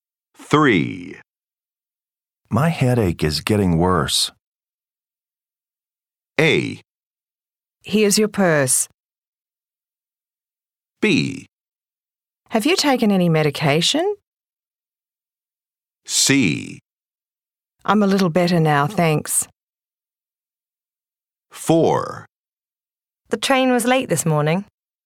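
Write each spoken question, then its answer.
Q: My headache is getting worse.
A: B: Have you taken any medication?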